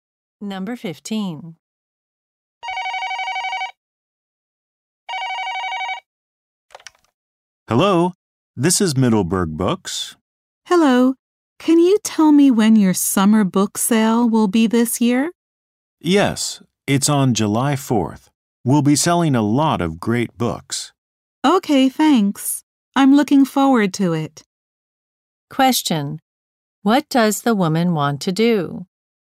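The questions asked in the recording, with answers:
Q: What does the woman want to do?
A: Go to the bookstore's summer book sale.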